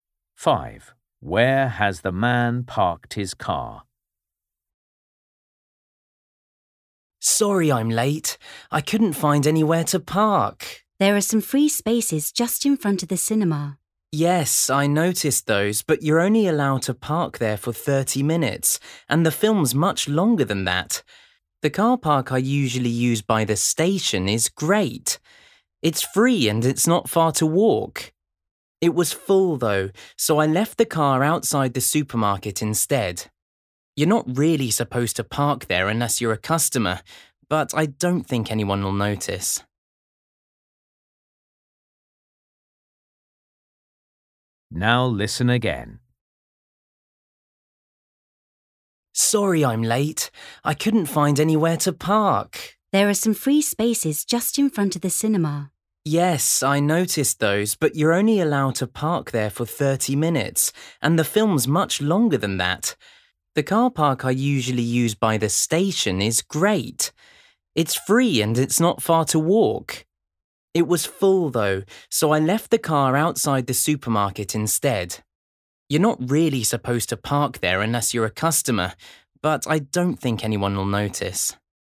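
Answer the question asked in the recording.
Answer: outside the supermarket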